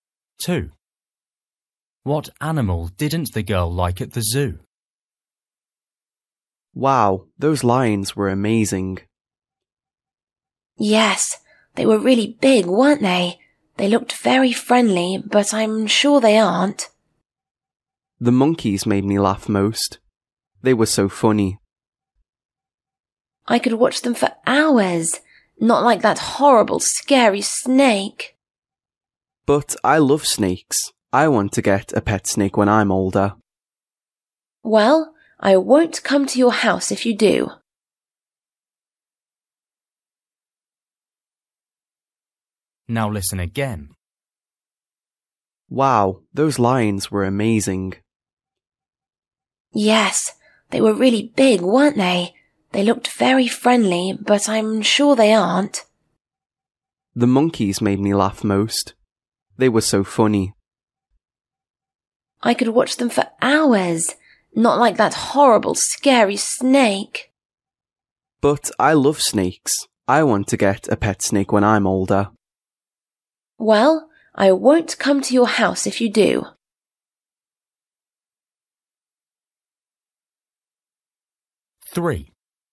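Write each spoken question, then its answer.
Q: What animal didn't the girl like at the zoo?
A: the snake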